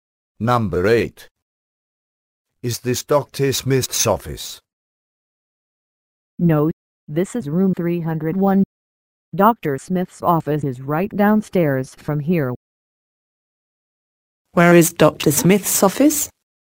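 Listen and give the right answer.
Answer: Right downstairs from room 301.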